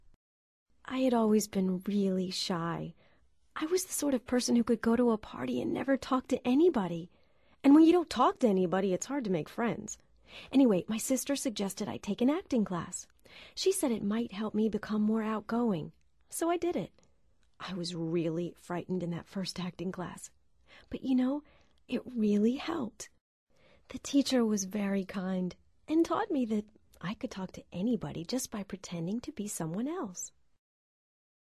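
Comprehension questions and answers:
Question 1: "You could talk to anybody just by pretending to be someone else".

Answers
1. First speaker (Helen)

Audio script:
I had always been really shy. I was the sort of person who could go to a party and never talk to anybody. And when you don't talk to anybody, it's hard to make friends. Anyway, my sister suggested I take an acting class. She said it might help me become more outgoing. So I did it. I was really frightened in that first acting class. But you know, it really helped. The teacher was very kind, and taught me that I could talk to anybody just by pretending to be someone else.

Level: Nivel Avanzado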